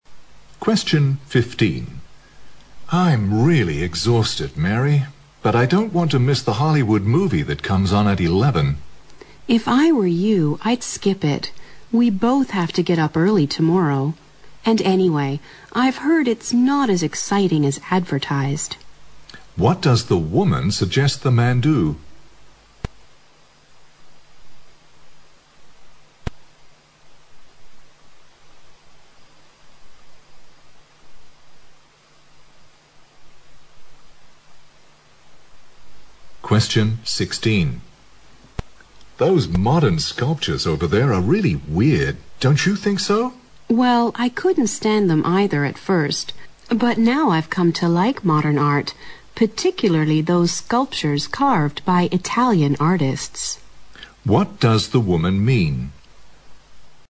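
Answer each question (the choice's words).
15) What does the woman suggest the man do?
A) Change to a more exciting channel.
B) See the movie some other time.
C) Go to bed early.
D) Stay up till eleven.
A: Go to bed early.

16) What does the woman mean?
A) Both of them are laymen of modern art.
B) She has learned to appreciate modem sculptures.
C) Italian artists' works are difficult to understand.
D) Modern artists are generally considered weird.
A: She has learned to appreciate modem sculptures.

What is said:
M: I'm really exhausted, Mary. But I don't want to miss the Hollywood movie that comes on at 11.
W: If I were you, I'd skip it. We both have to get up early tomorrow. And anyway I've heard it's not as exciting as advertised.
Q: What does the woman suggest the man do?
M: Those modern sculptures over there are really weird. Don't you think so?
W:Well, I couldn't stand them either at first. 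But now I've come to like modern art, particularly those sculptures carved by Italian artists.

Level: 六级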